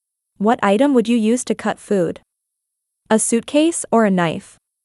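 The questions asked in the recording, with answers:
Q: What item would you use to cut food?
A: a knife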